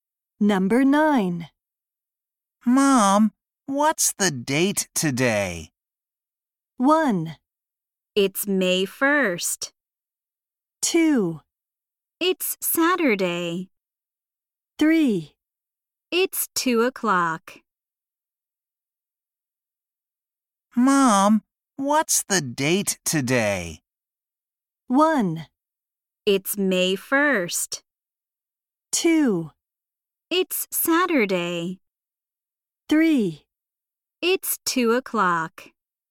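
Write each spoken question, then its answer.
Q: Mom, what's the date today?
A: 1: It's May 1st.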